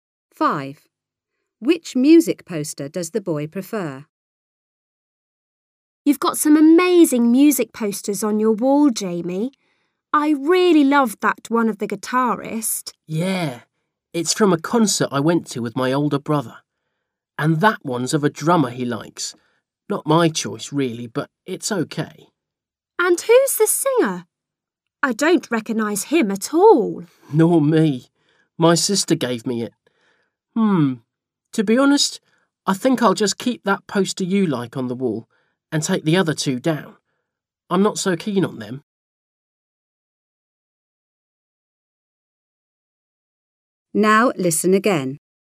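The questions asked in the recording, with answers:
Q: Which music poster does the boy prefer?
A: The one of the guitarist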